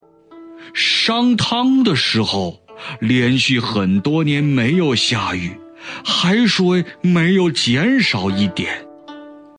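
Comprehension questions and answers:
★音声を聞き、空欄〇に当てはまる単語を探して、授業内課題用紙に漢字とピンインを書いてください。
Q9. 商汤的1〇〇连续很多年没有2〇〇,海水没有减少一点。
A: 1时候 2下雨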